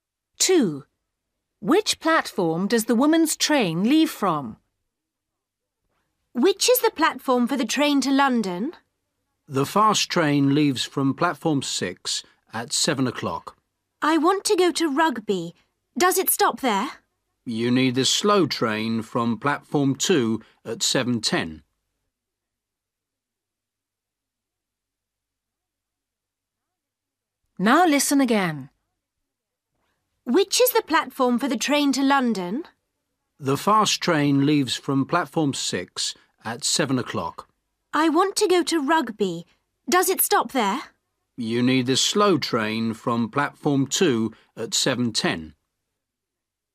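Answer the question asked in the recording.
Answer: Platform 2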